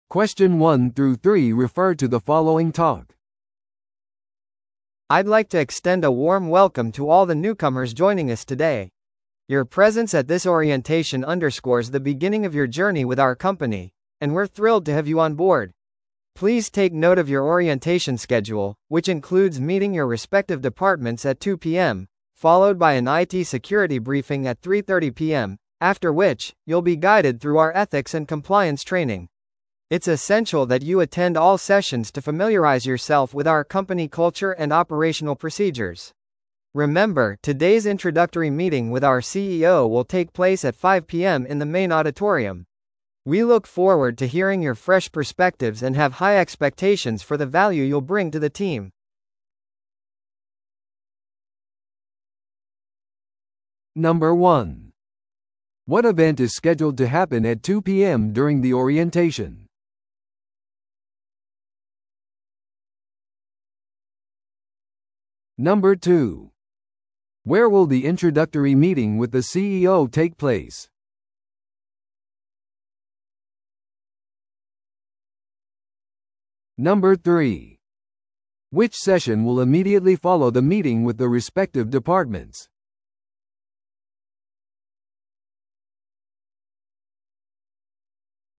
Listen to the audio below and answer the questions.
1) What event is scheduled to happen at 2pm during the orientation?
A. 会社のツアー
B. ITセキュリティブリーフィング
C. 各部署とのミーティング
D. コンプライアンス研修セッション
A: 各部署とのミーティング

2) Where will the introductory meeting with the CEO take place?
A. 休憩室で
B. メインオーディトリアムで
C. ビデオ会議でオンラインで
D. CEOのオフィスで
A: メインオーディトリアムで

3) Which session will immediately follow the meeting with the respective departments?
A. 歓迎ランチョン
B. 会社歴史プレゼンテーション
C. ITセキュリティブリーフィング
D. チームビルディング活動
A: ITセキュリティブリーフィング

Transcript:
I'd like to extend a warm welcome to all the newcomers joining us today. Your presence at this orientation underscores the beginning of your journey with our company, and we're thrilled to have you on board. Please take note of your orientation schedule, which includes meeting your respective departments at 2pm, followed by an IT security briefing at 3:30pm, after which, you'll be guided through our ethics and compliance training. It's essential that you attend all sessions to familiarize yourself with our company culture and operational procedures. Remember, today's introductory meeting with our CEO will take place at 5pm in the main auditorium. We look forward to hearing your fresh perspectives and have high expectations for the value you'll bring to the team.

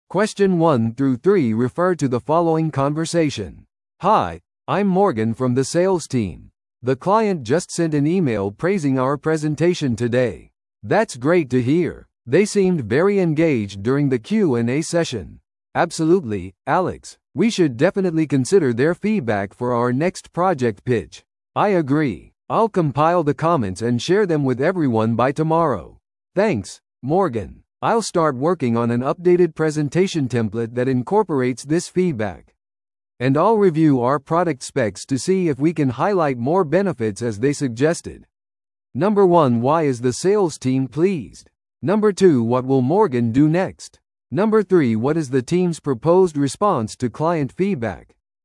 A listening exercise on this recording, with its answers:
Listen to the audio below and answer the questions.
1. Why is the sales team pleased?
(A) 彼らは努力に対するボーナスを受け取りました。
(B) 彼らのプレゼンテーションはクライアントから高く評価されました。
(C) 彼らはスケジュールより早くプロジェクトを完了しました。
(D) 彼らは上級の地位に昇進しました。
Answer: 彼らのプレゼンテーションはクライアントから高く評価されました。

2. What will Morgan do next?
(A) 新しい営業戦略を作成する。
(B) 今後の営業コールの準備をする。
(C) クライアントのフィードバックをチームに配布する。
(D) ニュースを会社のウェブサイトに更新する。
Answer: クライアントのフィードバックをチームに配布する。

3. What is the team's proposed response to client feedback?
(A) 関係のない提案なので無視する。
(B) 将来のプロジェクトでフィードバックを考慮に入れる。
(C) クライアントにもっと詳しい説明を求める。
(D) クライアントとのフォローアップミーティングを要求する。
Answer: 将来のプロジェクトでフィードバックを考慮に入れる。

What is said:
A: Hi, I'm Morgan from the sales team. The client just sent an email praising our presentation today.
B: That's great to hear! They seemed very engaged during the Q&A session.
C: Absolutely, Alex. We should definitely consider their feedback for our next project pitch.
A: I agree. I'll compile the comments and share them with everyone by tomorrow.
C: Thanks, Morgan. I'll start working on an updated presentation template that incorporates this feedback.
B: And I'll review our product specs to see if we can highlight more benefits as they suggested.

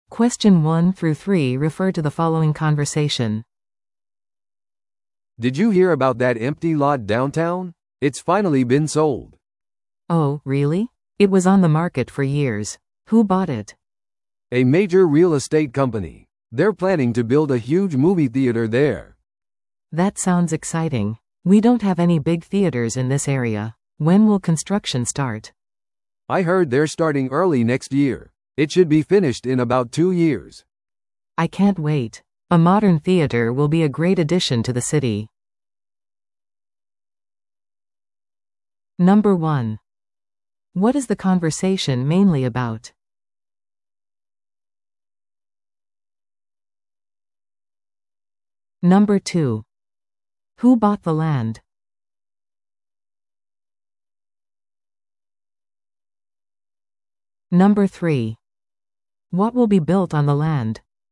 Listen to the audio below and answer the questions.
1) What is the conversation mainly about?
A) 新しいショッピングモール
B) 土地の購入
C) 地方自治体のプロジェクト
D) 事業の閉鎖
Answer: 土地の購入

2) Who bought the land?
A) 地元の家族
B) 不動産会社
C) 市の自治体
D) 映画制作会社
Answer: 不動産会社

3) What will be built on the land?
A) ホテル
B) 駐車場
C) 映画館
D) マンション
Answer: 映画館

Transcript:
A: "Did you hear about that empty lot downtown? It's finally been sold."
B: "Oh, really? It was on the market for years. Who bought it?"
A: "A major real estate company. They're planning to build a huge movie theater there."
B: "That sounds exciting! We don't have any big theaters in this area. When will construction start?"
A: "I heard they're starting early next year. It should be finished in about two years."
B: "I can't wait! A modern theater will be a great addition to the city."

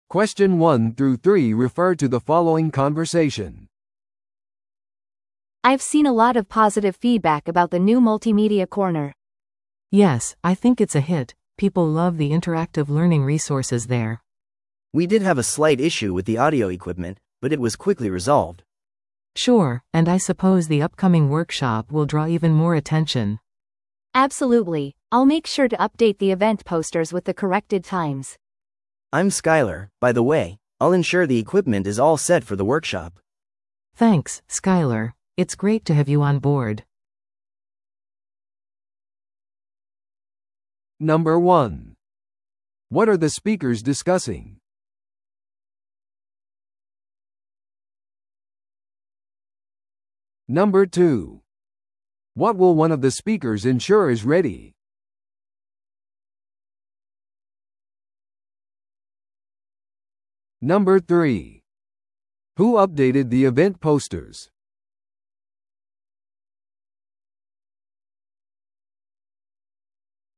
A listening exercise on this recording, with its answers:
Listen to the audio below and answer the questions.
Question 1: What are the speakers discussing?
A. 新しいオーディオ機器が必要である。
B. 図書館の通常の開館時間について。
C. 図書館サービスに対する肯定的な反応。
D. テクノロジー製品の出荷遅延について。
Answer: 図書館サービスに対する肯定的な反応。

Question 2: What will one of the speakers ensure is ready?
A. 次回の訪問のためのマルチメディアコーナー。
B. 間もなく開催されるワークショップの機器。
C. スタッフミーティング用のリフレッシュメント。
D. 特別イベント用の本の展示。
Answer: 間もなく開催されるワークショップの機器。

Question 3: Who updated the event posters?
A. スカイラー。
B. 最初に話した女性。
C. 他の支店の図書館員。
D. マルチメディアコーナーのマネージャー。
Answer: 最初に話した女性。

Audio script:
A: I've seen a lot of positive feedback about the new multimedia corner.
B: Yes, I think it's a hit! People love the interactive learning resources there.
C: We did have a slight issue with the audio equipment, but it was quickly resolved.
B: Sure, and I suppose the upcoming workshop will draw even more attention.
A: Absolutely, I'll make sure to update the event posters with the corrected times.
C: I'm Skyler, by the way. I'll ensure the equipment is all set for the workshop.
B: Thanks, Skyler. It's great to have you on board.

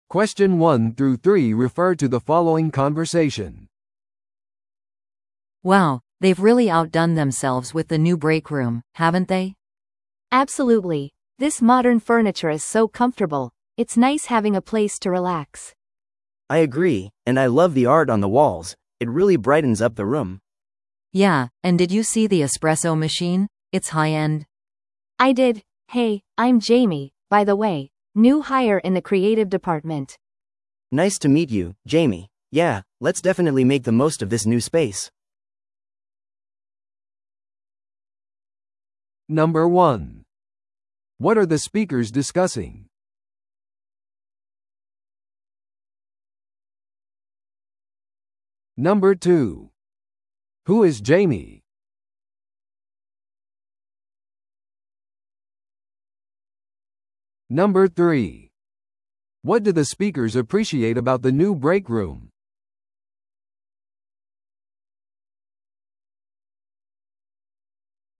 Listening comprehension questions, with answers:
Listen to the audio below and answer the questions.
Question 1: What are the speakers discussing?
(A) 新しいオフィスの場所。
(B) 改装された休憩室。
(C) 最近の会社の合併。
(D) クリエイティブなプロジェクト。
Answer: 改装された休憩室。

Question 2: Who is Jamie?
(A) 休憩室のデザイナー。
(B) クリエイティブ部門の新入社員。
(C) 壁のアートを担当する人。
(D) エスプレッソマシンの供給者。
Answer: クリエイティブ部門の新入社員。

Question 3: What do the speakers appreciate about the new break room?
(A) オフィス内の便利なロケーション。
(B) 明るい照明器具。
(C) モダンな家具とアート。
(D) チームビルディングの活動の機会。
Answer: モダンな家具とアート。

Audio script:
A: Wow, they've really outdone themselves with the new break room, haven't they?
B: Absolutely! This modern furniture is so comfortable. It's nice having a place to relax.
C: I agree, and I love the art on the walls. It really brightens up the room!
A: Yeah, and did you see the espresso machine? It's high-end!
B: I did! Hey, I'm Jamie, by the way. New hire in the creative department.
C: Nice to meet you, Jamie. Yeah, let's definitely make the most of this new space!

